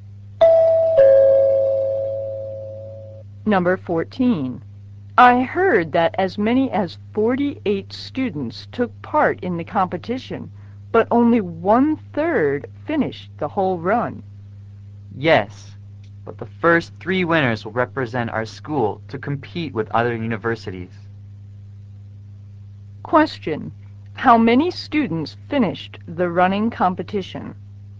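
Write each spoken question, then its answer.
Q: How many students finished the running competition?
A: 16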